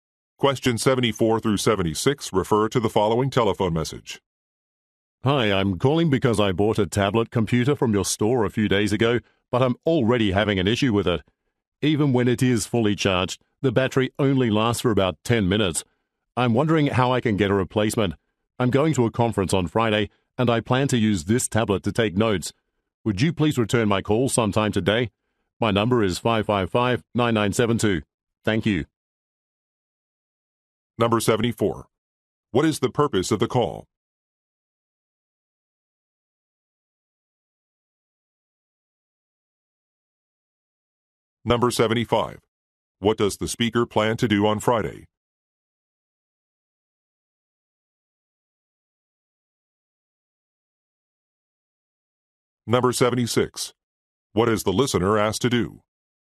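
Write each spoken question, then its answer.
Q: What is the purpose of the call?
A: To get a replacement for a faulty tablet

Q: What does the speaker plan to do on Friday?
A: Attend a conference

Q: What is the listener asked to do?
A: Return the call today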